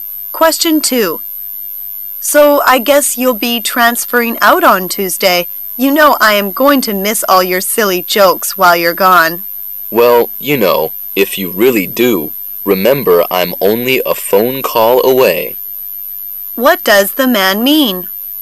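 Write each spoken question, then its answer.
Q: What does the man mean?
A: They can keep in touch by phone.

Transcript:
[解析] W: So I guess you'll be transferring out on Tuesday. You know I am going to miss all your silly jokes while you're gone. M: Well, you know, if you really do, remember I'm only a phone call away. Q: What does the man mean?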